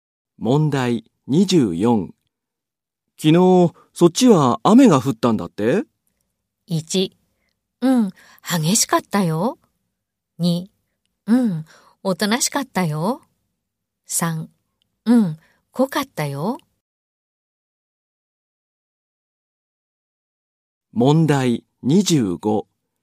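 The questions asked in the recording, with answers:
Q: 昨日、そっちは雨が降ったんだって?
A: 1: うん、激しかったよ。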